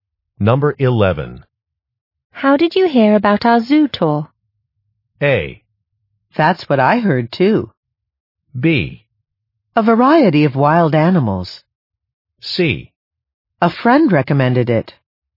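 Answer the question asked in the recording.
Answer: C: A friend recommended it.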